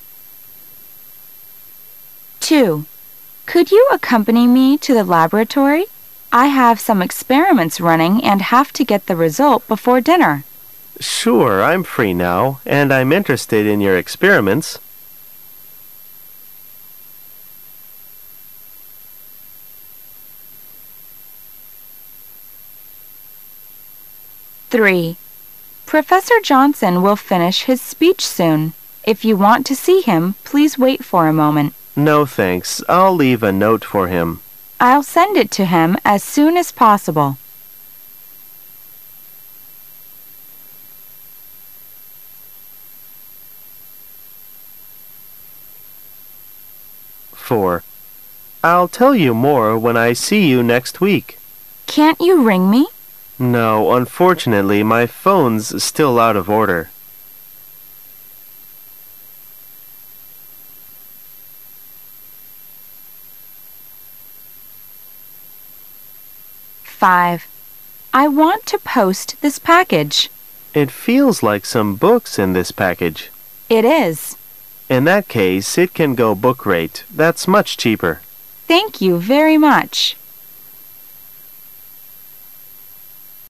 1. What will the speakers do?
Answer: Go to the laboratory.

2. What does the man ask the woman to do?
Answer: Send a note to Professor Johnson.

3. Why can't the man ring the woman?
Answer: His telephone doesn't work.

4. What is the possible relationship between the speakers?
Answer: Post office clerk and customer.